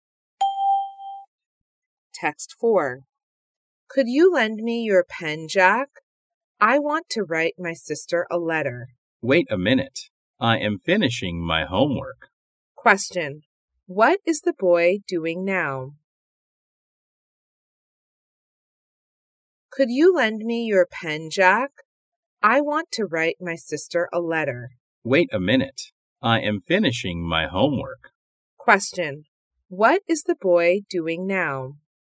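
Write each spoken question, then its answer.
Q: What is the boy doing now?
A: Finishing his homework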